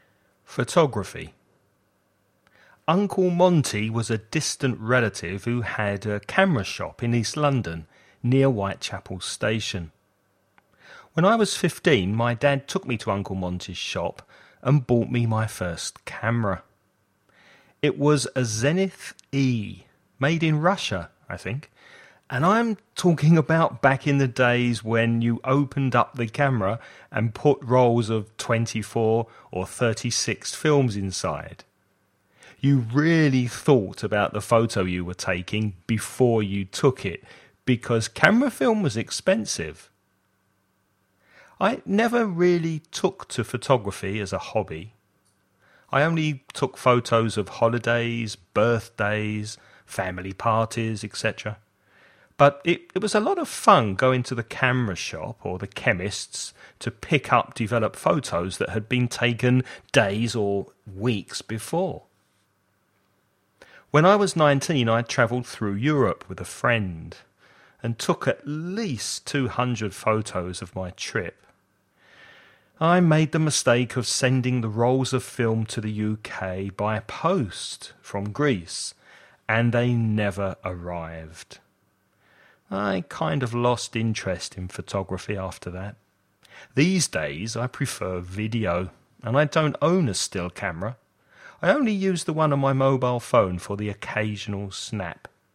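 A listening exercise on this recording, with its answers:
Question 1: How old was the man when he got his first camera?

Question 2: Where was his first camera made?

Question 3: Which two places did the man go to in order to develop his photos when he was young?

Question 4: How old was the man when he travelled through Europe?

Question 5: What happened to the photos that the man took while he was travelling in Europe?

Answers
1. 15
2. In Russia
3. The camera shop and the chemists
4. 19
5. He sent the films to the UK by post from Greece and they never arrived

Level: nivel Intermedio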